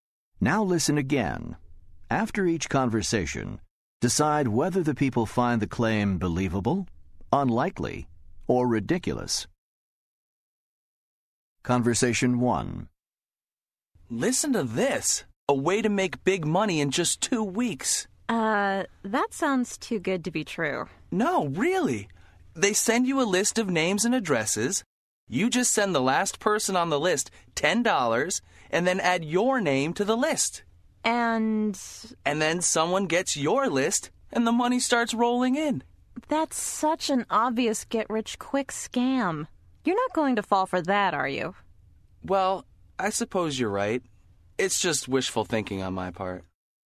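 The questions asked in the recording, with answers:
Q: After each conversation, decide whether the people find the claim believable, unlikely, or ridiculous.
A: ridiculous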